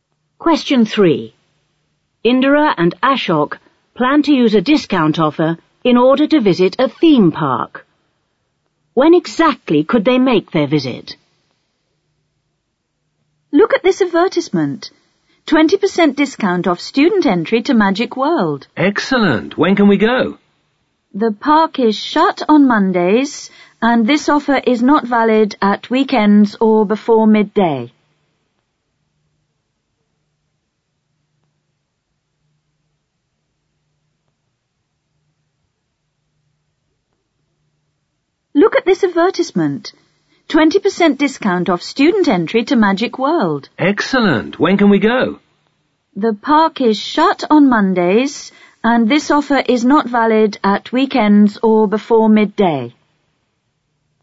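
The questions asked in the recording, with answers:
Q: When exactly could they make their visit?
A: Tuesday to Friday, after midday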